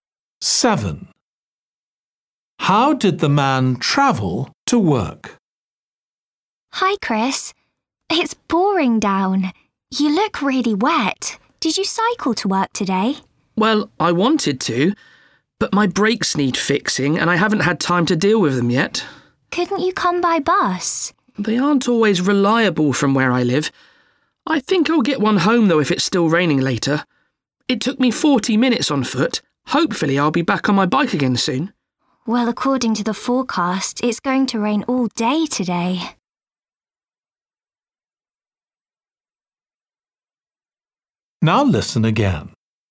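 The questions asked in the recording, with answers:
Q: How did the man travel to work?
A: on foot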